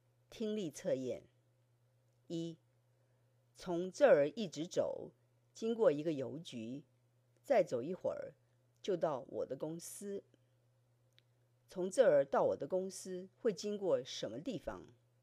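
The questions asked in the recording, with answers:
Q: 从这儿到我的公司会经过什么地方?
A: 邮局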